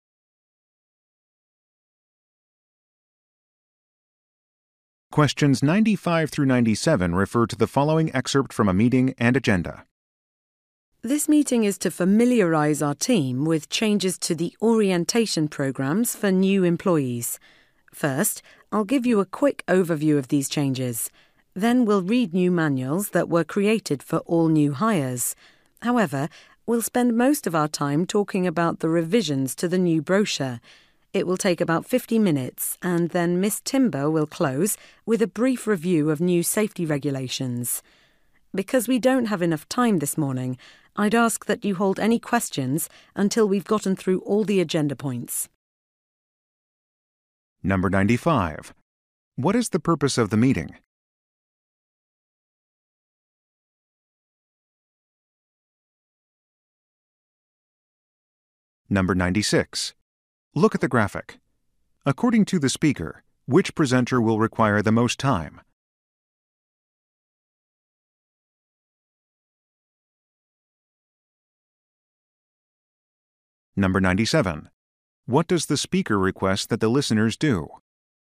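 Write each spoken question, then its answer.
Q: What is the purpose of the meeting?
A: To familiarize the team with changes to the new-employee orientation programs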